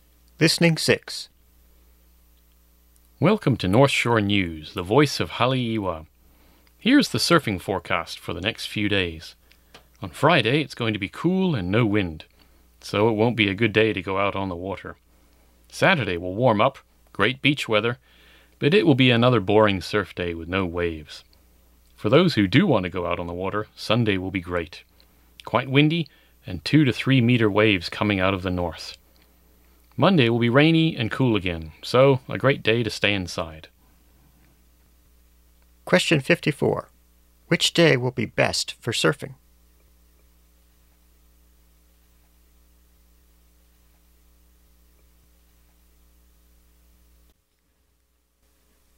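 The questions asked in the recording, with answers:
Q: Which day will be best for surfing?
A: Sunday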